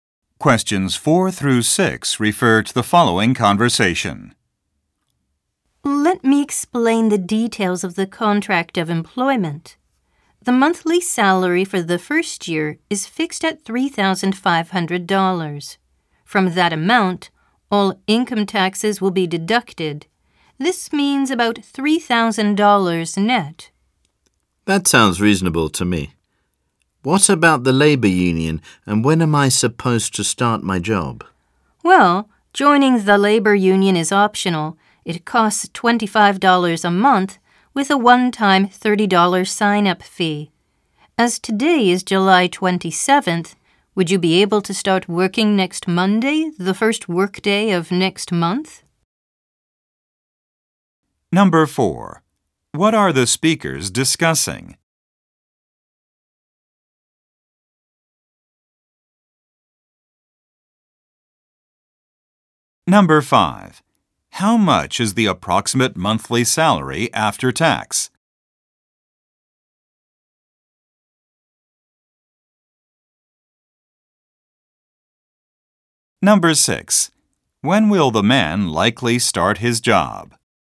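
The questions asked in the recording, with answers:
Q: What are the speakers discussing?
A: The details of an employment contract

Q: How much is the approximate monthly salary after tax?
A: About $3,000

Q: When will the man likely start his job?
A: Next Monday, the first workday of next month (August)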